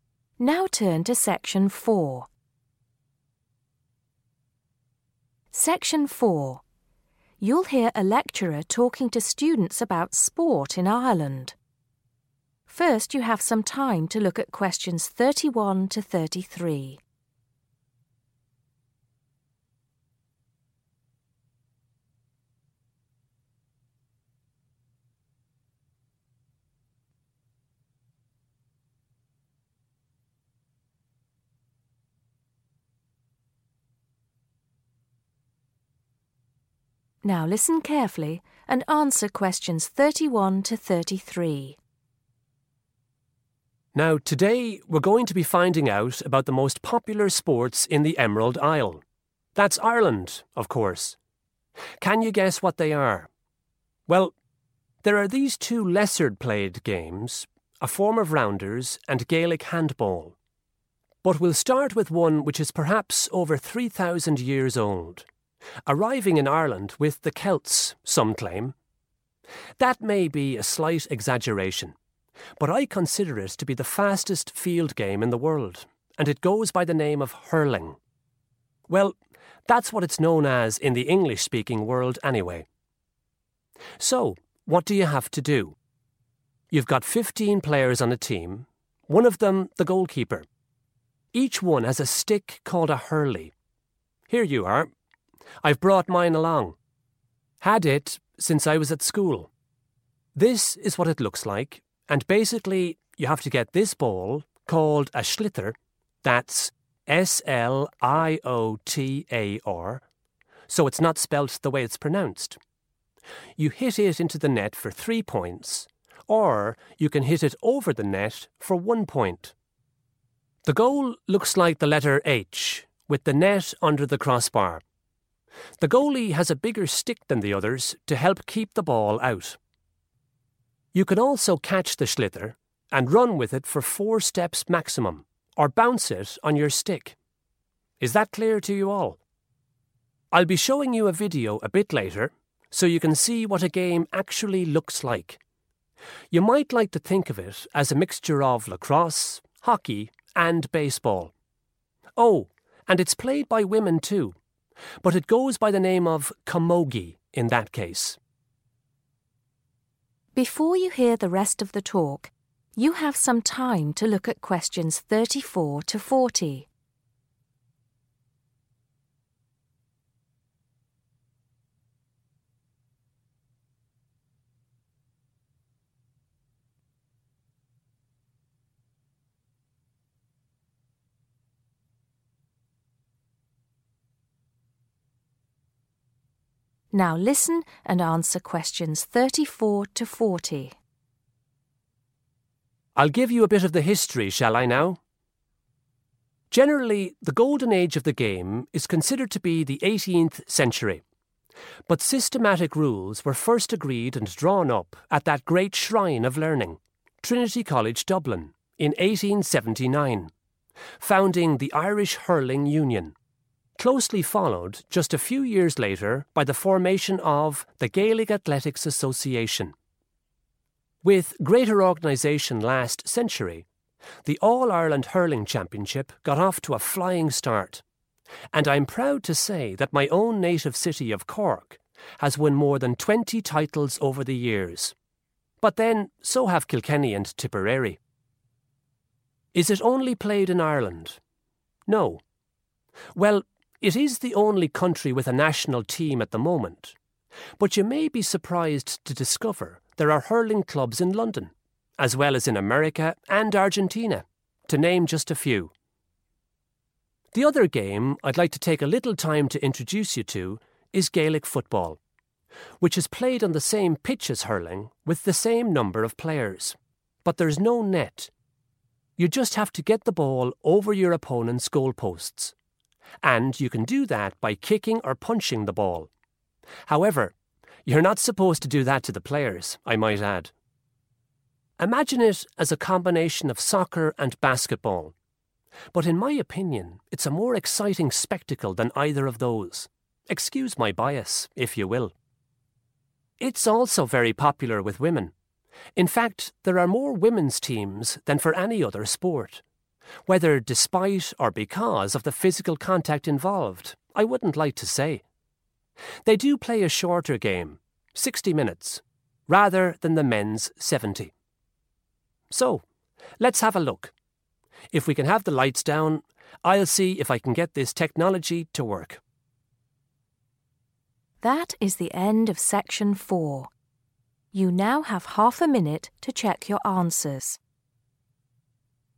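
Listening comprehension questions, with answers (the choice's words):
Choose the correct letter, A, B or C.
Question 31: The speaker says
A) rounders is the most popular Irish sport.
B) Gaelic handball is thousands of years old.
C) hurling may have been an ancient Celtic game.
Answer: hurling may have been an ancient Celtic game.

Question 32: The speaker probably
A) used to play hurling.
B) shows the students a photo.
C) can't speak any Gaelic.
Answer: used to play hurling.

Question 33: In hurling, you cannot score by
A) hitting the ball over the net.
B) hitting the ball into the net.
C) kicking the ball into or over the net.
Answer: kicking the ball into or over the net.

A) in the 20th century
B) in the 19th century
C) in the 18th century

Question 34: Hurling experienced a golden age.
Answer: in the 18th century

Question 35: A university established a set of rules.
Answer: in the 19th century

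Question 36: The Gaelic Athletics Association was started.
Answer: in the 19th century

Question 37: The All Ireland Hurling Championship began.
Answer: in the 20th century

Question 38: ........................has a national hurling team.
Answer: Ireland

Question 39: Gaelic football is like a mixture of the sports of........................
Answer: soccer and basketball

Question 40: Women play the game for a................... time.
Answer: shorter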